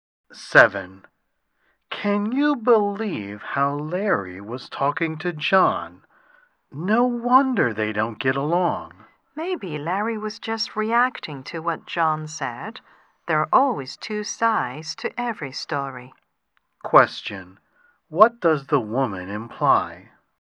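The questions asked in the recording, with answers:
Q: What does the woman imply?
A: Larry may not be the only one to blame.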